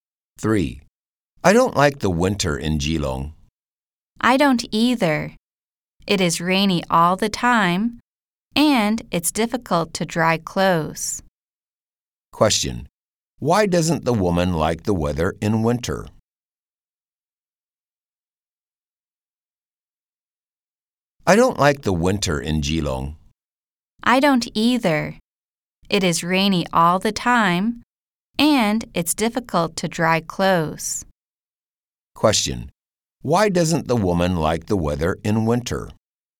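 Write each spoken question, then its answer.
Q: Why doesn't the woman like the weather in winter?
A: It is rainy all the time and difficult to dry clothes.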